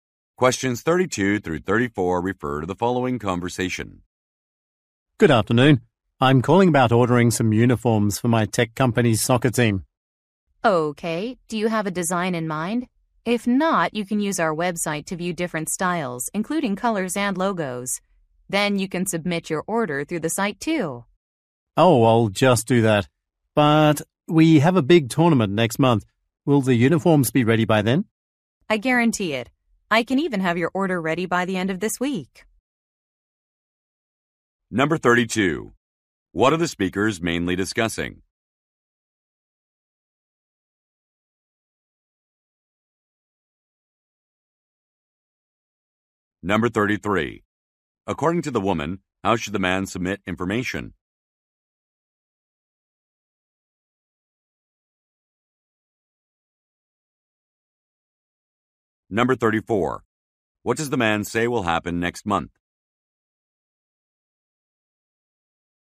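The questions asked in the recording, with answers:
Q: What are the speakers mainly discussing?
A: Ordering uniforms for a soccer team

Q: According to the woman, how should the man submit information?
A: Through the website

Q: What does the man say will happen next month?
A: A big tournament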